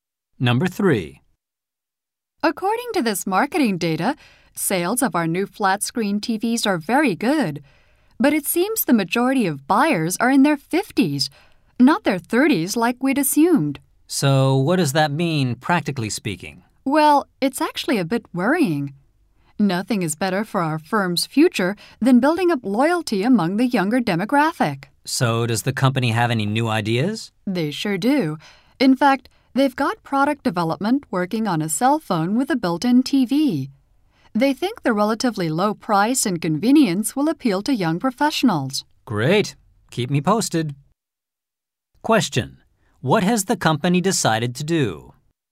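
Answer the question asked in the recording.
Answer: Develop a cell phone with a built-in TV to appeal to young professionals.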